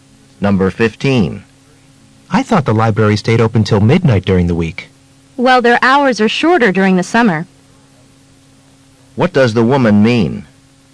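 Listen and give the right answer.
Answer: The library closes earlier in summer.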